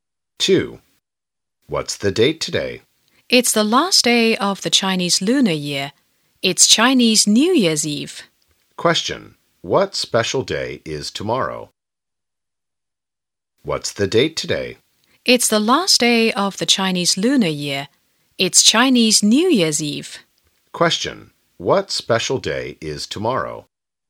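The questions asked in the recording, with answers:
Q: Question. What special day is tomorrow?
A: Spring Festival (Chinese New Year)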